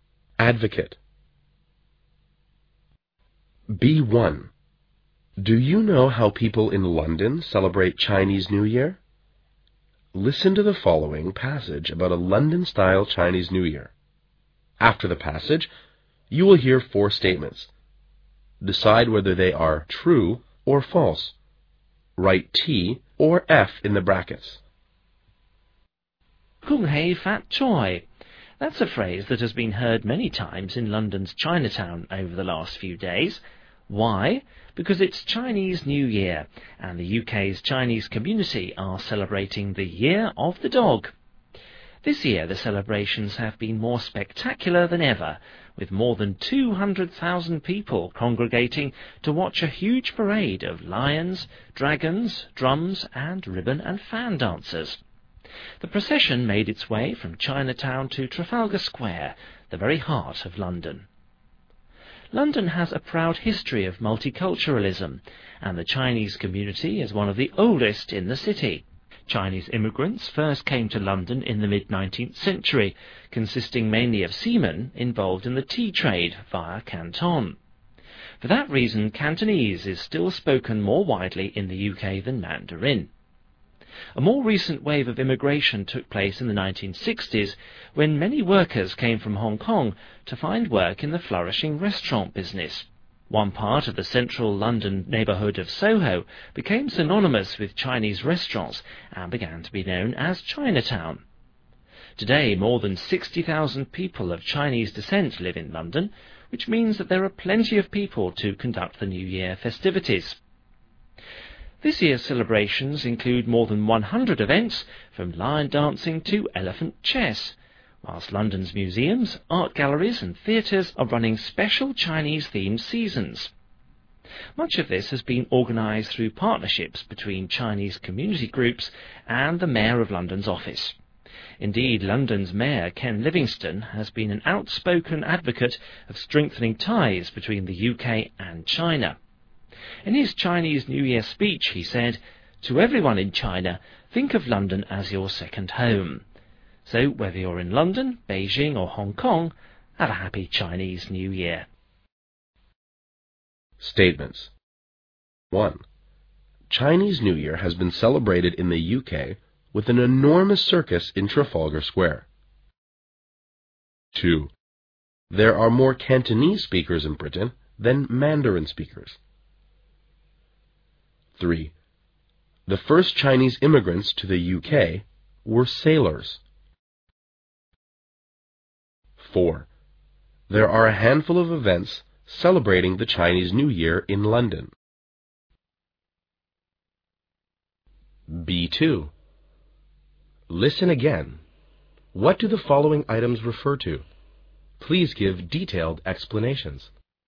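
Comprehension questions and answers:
After the passage, you'll hear four statements, decide whether they are true or false. Write "T" or "F" in the brackets.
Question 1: Chinese New Year has been celebrated in the UK with an enormous circus in Trafalgar Square.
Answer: F

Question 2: There are more Cantonese speakers in Britain than Mandarin speakers.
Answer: T

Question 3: The first Chinese immigrants to the UK were sailors.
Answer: T

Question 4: There are a handful of events celebrating the Chinese New Year in London.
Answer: F

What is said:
flourishing, synonymous, descent, lion-dancing, elephant chess, mayor, outspoken, advocate.
B1. Do you know how people in London celebrate Chinese New Year?
Listen to the following passage about a London style Chinese New Year.
After the passage, you'll hear four statements, decide whether they are true or false. Write "T" or "F" in the brackets.
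Kung Hei Fat Choi. That's a phrase that's just been heard many times in London's Chinatown over the last few days.
Why? Because it's Chinese New Year, and the UK's Chinese community are celebrating the year of the dog.
This year the celebrations have been more spectacular than ever, with more than 200,000 people congregating to watch a huge parade of lions, dragons, drums and ribbon and fun dancers.
The procession made its way from Chinatown to Trafalgar Square, the very heart of London.
London has a proud history of multiculturalism, and the Chinese Community is one of the oldest in the city.
Chinese immigrants first came to London in the mid-19th century, consisting mainly of seamen involved in the tea trade, via Canton.
For that reason, Cantonese is still spoken more widely in the UK than Mandarin.
A more recent wave of immigration took place in the 1960's when many workers came from Hong Kong to find work in the flourishing restaurant business.
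One part of the central London neighborhood of Soho becomes synonymous with Chinese restaurants and began to be known as a Chinatown.
Today, more than 60,000 people of Chinse descent live in London, which means that there are plenty of people to conduct the New Year festivities.
This year's celebrations include more than 100 events, from lion-dancing to elephant chess.
Whilst London's museums, art galleries and theaters are running special Chinese-themed seasons.
Much of this has been organized through partnership between Chinese community groups and the mayor of London's office.
Indeed London's mayor, Ken Livingstone, has been an outspoken advocate of strengthening ties between the UK and China.
In his Chinese New Year speech, he said "To everyone in China, think of London as your second home. So, whether you're in London, Beijing or Hong Kong, have a happy Chinese New Year."
Statements.
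1.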